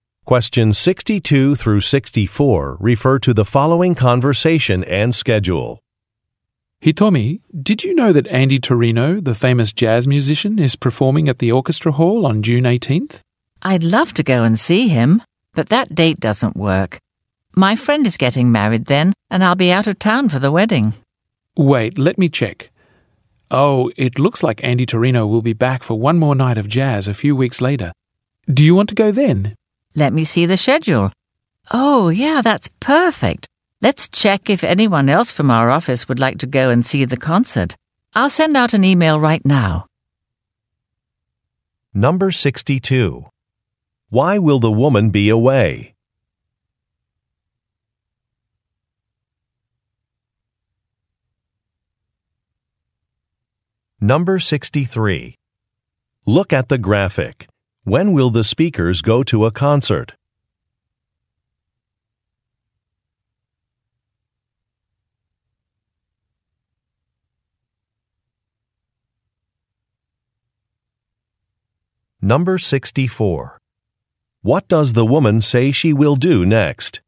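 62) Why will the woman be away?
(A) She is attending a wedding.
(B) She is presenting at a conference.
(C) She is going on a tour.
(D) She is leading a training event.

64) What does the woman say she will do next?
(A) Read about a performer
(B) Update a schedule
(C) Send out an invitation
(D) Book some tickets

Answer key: 62A, 64C

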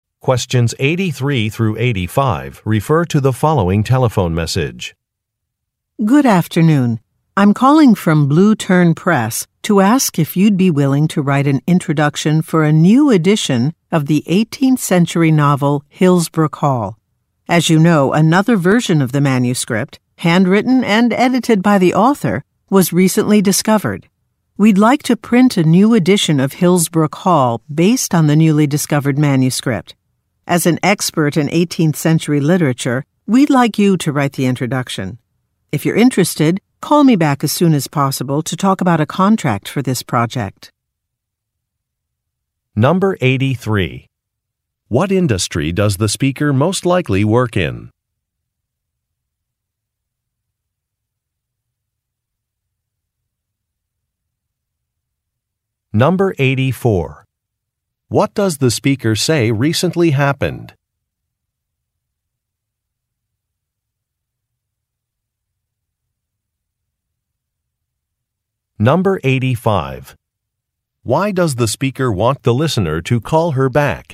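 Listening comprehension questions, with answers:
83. What industry does the speaker most likely work in?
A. Publishing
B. Advertising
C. Film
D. Hospitality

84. What does the speaker say recently happened?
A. A book was made into a film.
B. A new executive was hired.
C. A manuscript was found.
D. An anniversary celebration was held.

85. Why does the speaker want the listener to call her back?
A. To finalize a design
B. To confirm a guest list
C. To discuss a contract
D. To develop a timeline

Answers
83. A
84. C
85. C

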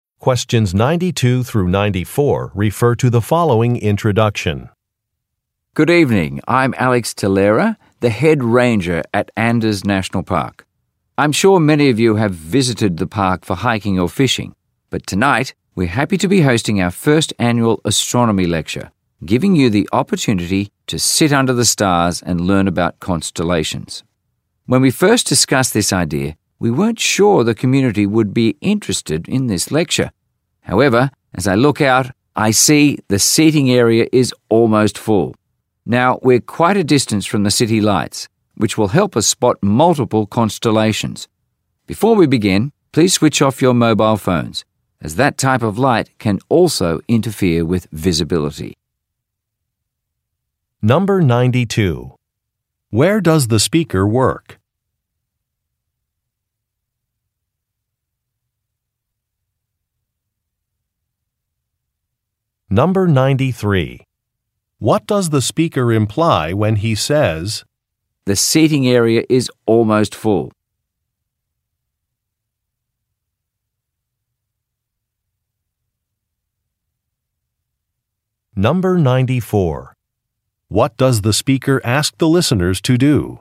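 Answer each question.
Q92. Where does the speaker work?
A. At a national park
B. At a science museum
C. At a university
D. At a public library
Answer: A

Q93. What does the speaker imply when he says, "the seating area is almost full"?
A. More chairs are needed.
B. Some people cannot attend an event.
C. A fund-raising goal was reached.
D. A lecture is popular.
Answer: D

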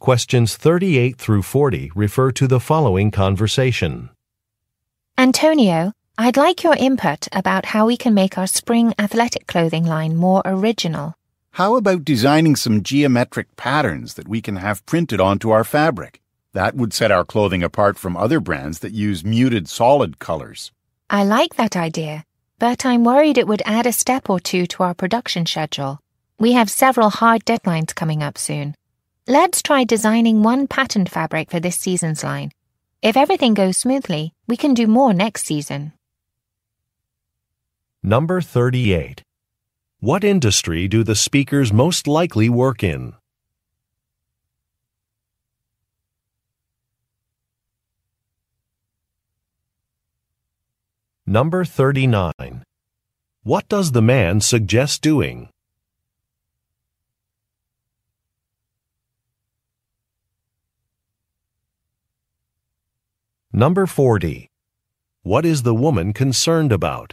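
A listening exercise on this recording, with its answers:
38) What industry do the speakers most likely work in?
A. Television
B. Fashion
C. Home furnishings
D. Advertising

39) What does the man suggest doing?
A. Providing tours of a facility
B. Opening a branch office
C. Designing special fabric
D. Installing brighter lights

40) What is the woman concerned about?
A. A plan would be time-consuming.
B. A color is too bright.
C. Some sales figures have declined.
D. Some supplies will be expensive.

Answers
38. B
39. C
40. A

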